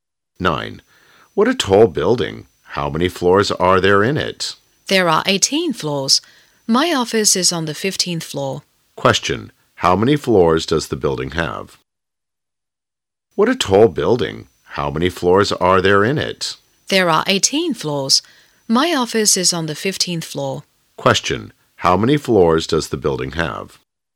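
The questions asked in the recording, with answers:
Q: Question. How many floors does the building have?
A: 18 floors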